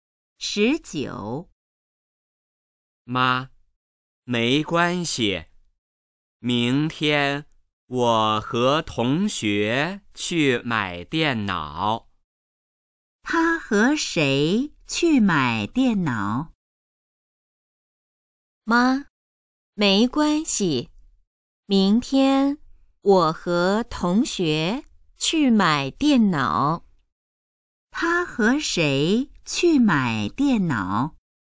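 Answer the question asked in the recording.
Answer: 同学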